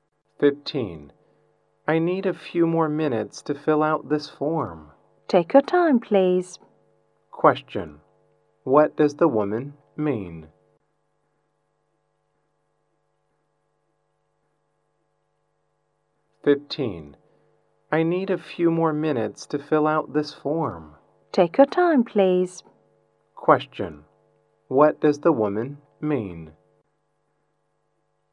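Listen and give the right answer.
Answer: There is no hurry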